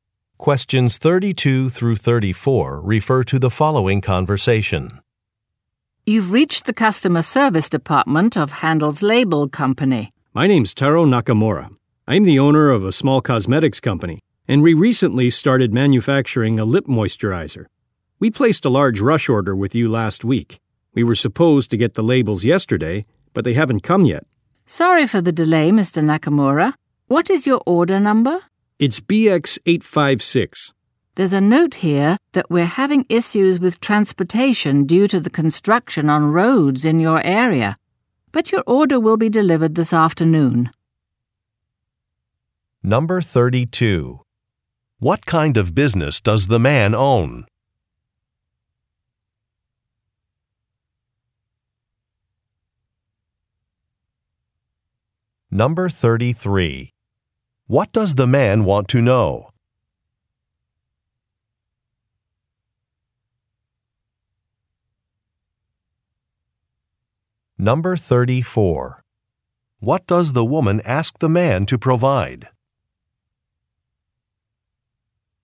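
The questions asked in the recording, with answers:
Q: What kind of business does the man own?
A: A cosmetics company

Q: What does the man want to know?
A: Why his label order has not arrived

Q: What does the woman ask the man to provide?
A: His order number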